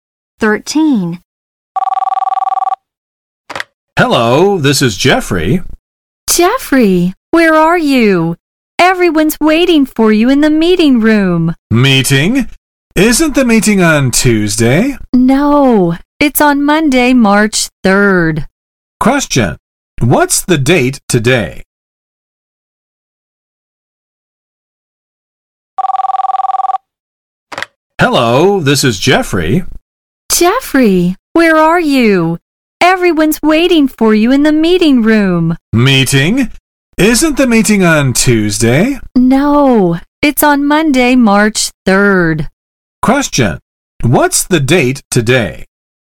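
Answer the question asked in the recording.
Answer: Monday, March 3rd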